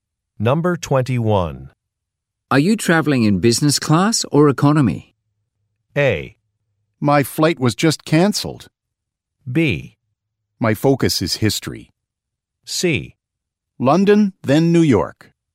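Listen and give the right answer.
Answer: A: My flight was just cancelled.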